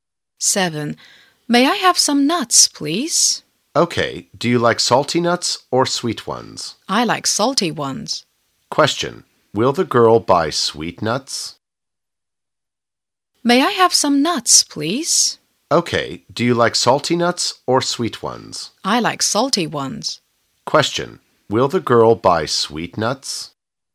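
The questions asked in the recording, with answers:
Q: Will the girl buy sweet nuts?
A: No, she likes salty ones.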